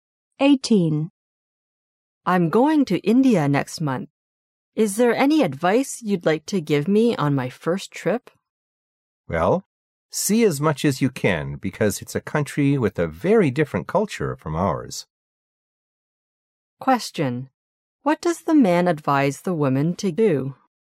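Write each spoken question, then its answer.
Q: What does the man advise the woman to do?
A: See as much as she can.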